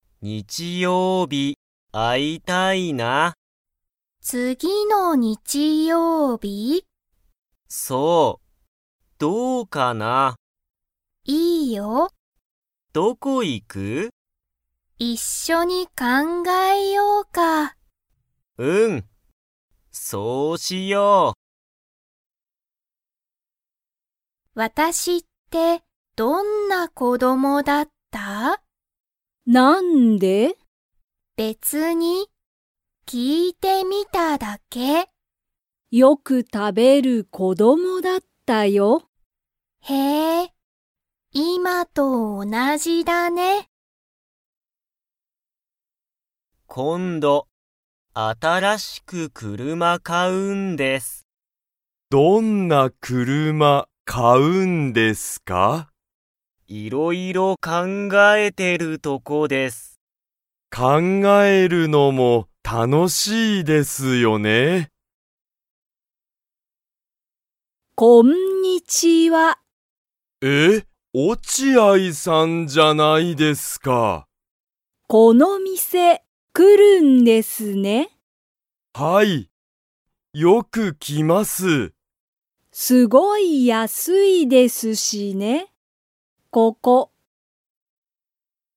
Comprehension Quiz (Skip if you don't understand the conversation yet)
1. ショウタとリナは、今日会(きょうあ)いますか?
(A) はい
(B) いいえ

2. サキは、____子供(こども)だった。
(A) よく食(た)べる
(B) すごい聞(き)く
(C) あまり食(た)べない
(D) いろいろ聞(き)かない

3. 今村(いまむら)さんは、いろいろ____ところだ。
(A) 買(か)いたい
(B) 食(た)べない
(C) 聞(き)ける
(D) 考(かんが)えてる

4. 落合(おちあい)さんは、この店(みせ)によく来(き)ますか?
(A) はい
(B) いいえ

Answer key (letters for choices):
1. B
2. A
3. D
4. A

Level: Level 1